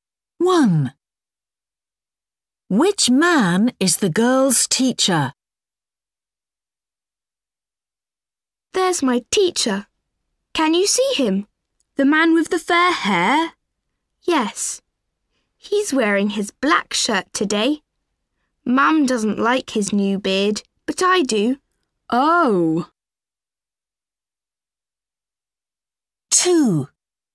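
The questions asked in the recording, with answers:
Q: Which man is the girl's teacher?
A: The man with fair hair, a black shirt and a beard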